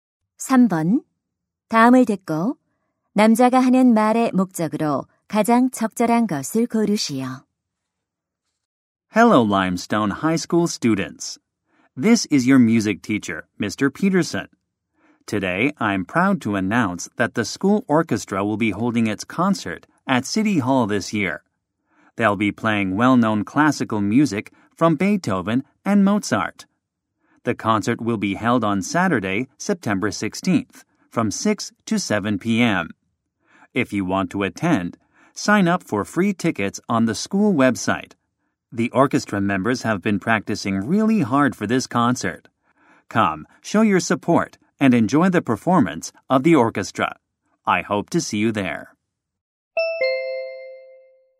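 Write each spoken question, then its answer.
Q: 다음을 듣고 남자가 하는 말의 목적으로 가장 적절한 것을 고르시오.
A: 학교 오케스트라 연주회를 홍보하려고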